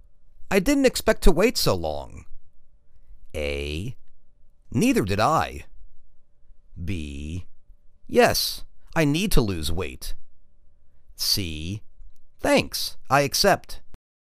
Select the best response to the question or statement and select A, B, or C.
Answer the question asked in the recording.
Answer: Neither did I.